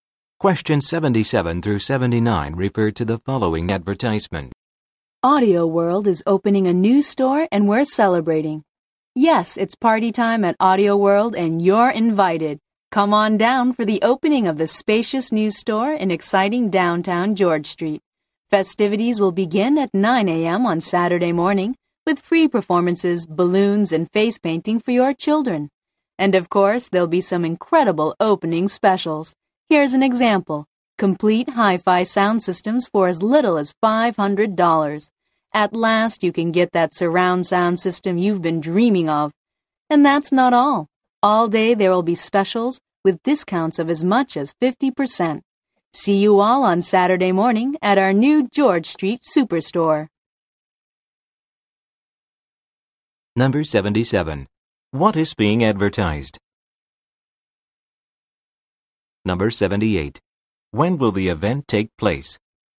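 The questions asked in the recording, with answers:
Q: What is being advertised?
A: The opening of a new Audio World store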